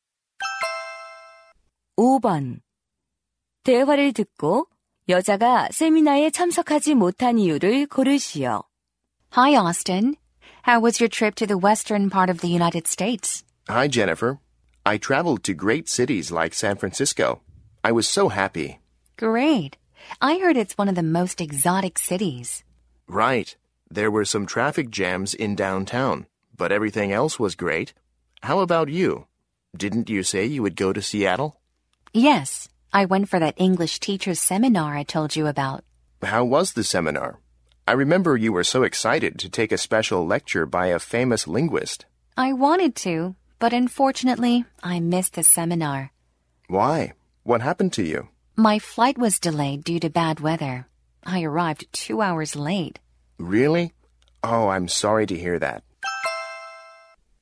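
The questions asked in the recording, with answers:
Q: 대화를 듣고 여자가 세미나에 참석하지 못한 이유를 고르시오.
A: 악천후로 비행기가 지연되어서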